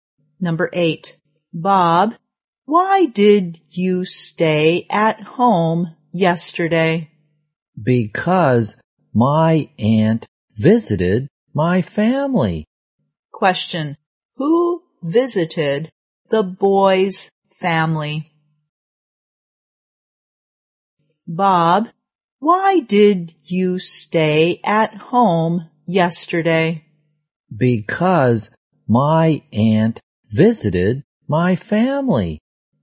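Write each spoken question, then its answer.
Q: Who visited the boy's family?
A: His aunt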